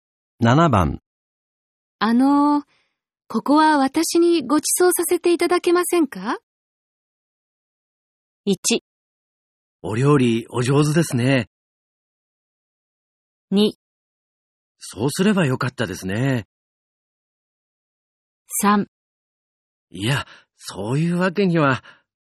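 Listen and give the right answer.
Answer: 3: いや、そういうわけには。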